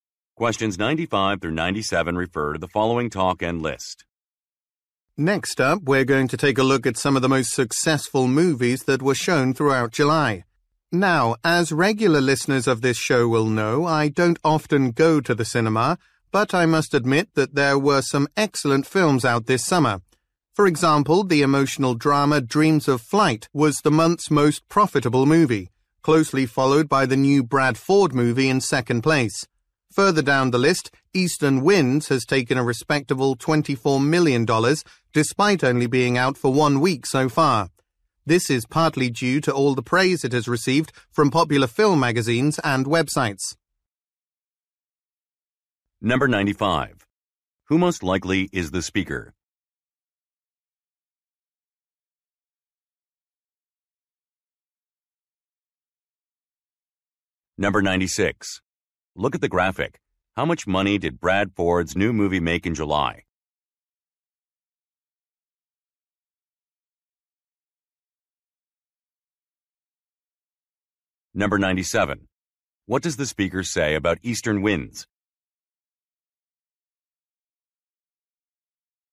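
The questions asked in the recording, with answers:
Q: What does the speaker say about Eastern Winds?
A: It has been praised by film magazines and websites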